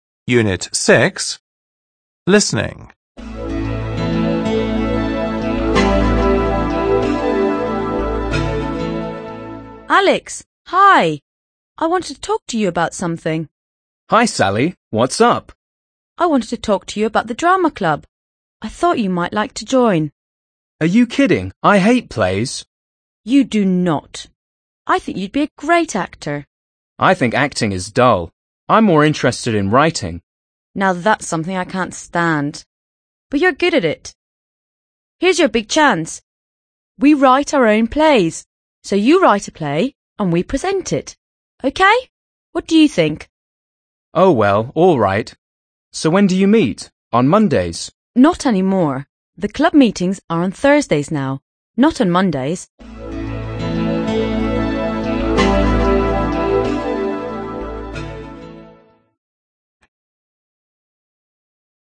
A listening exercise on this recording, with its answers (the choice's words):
2. Listen and tick (✓) the correct answer.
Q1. Alex hates – Алекс ненавидит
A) actors – актёров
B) drama clubs – драматические кружки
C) plays – пьесы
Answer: plays – пьесы

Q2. Alex thinks acting is – Алекс думает, что игра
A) exciting – захватывающая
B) dull – скучная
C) fun – весёлая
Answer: dull – скучная

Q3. Sally doesn't like – Салли не любит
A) writing – писать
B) working – работать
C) acting – играть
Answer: writing – писать

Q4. The club meetings are on – Встречи клуба проходят по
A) Mondays – по понедельникам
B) Tuesdays – по вторникам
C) Thursdays – по четвергам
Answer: Thursdays – по четвергам

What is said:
Sally: I wanted to talk to you about the drama club. I thought you might like to join.
Sally: You do not! I think you'd be a great actor.
Alex: I think acting is dull. I'm more interested in writing.
Sally: Now that's something I can't stand! But you're good at it. Here's your big chance! We write our own plays! So, you write a play and we present it. What do you think?

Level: 6 класс